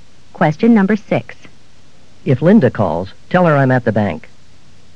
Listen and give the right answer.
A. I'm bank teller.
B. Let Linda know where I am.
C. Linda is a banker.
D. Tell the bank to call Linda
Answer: B. Let Linda know where I am.

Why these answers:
If Linda calls, tell her I'm at the bank.